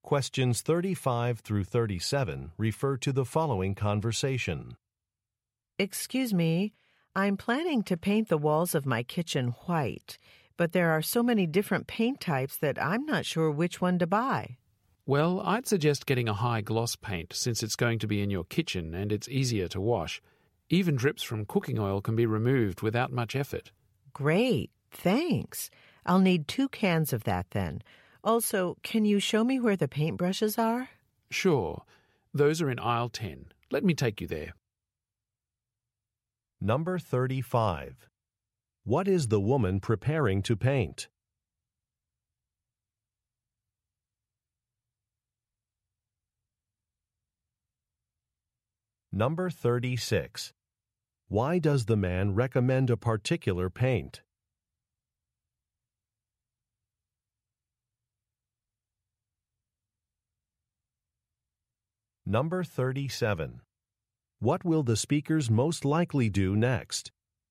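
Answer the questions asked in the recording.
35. Her kitchen walls
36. It is easy to wash
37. Go to aisle 10 to find paintbrushes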